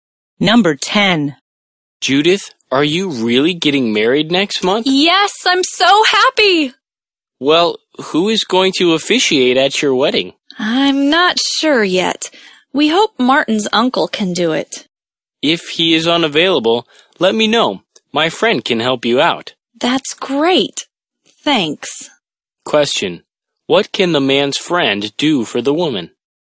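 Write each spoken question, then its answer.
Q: What can the man's friend do for the woman?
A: Officiate at her wedding if Martin's uncle is unavailable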